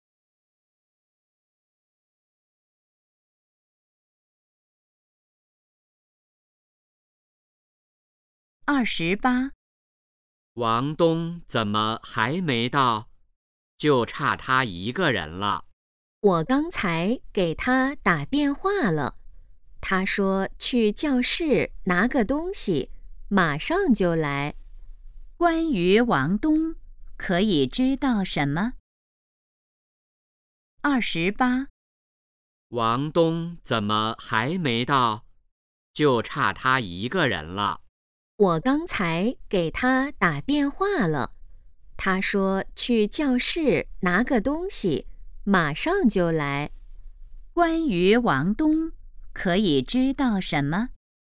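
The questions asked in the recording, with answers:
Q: 关于王东,可以知道什么?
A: 他去教室拿东西了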